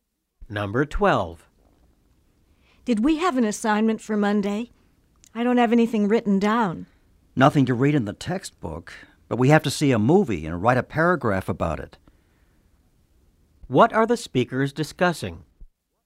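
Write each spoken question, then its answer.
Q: What are the speakers discussing?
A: An assignment for Monday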